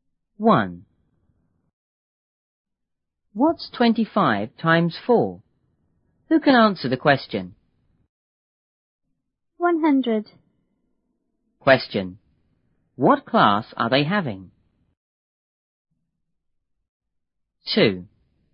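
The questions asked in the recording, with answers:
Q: What class are they having?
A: A maths class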